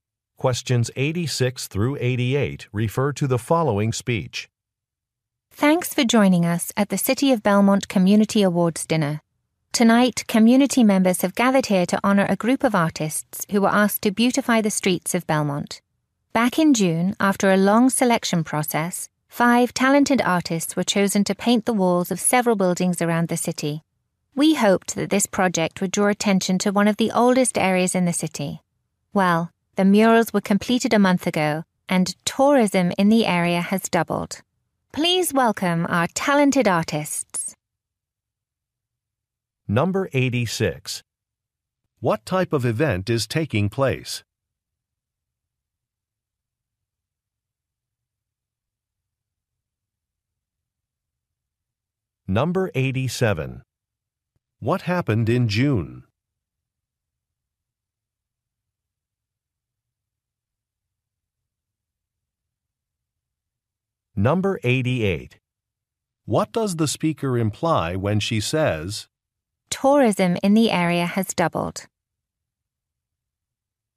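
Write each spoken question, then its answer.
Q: What type of event is taking place?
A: An awards dinner

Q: What happened in June?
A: Artists were selected

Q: What does the speaker imply when she says,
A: The project was successful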